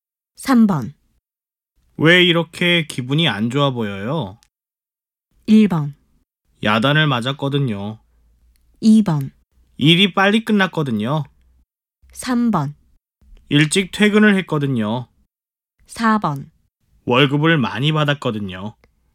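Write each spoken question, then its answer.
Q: 왜 이렇게 기분이 안 좋아 보여요?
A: 1: 야단을 맞았거든요.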